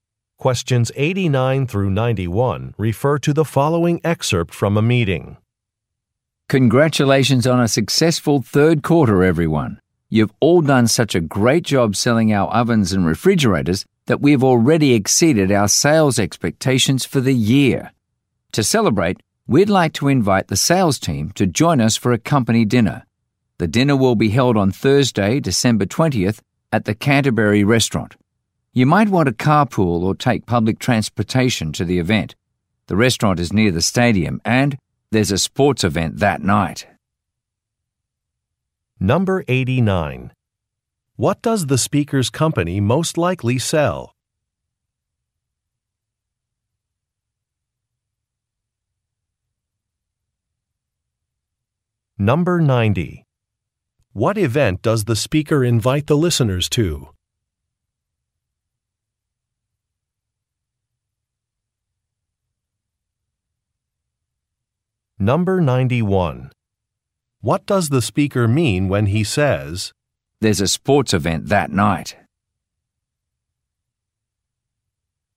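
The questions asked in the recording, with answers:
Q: What does the speaker's company most likely sell?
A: Kitchen appliances (ovens and refrigerators)

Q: What event does the speaker invite the listeners to?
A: A company dinner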